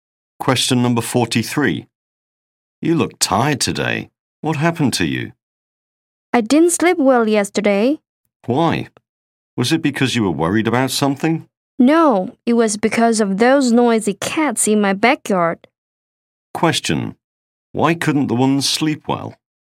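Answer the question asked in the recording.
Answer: Because of the noisy cats in the backyard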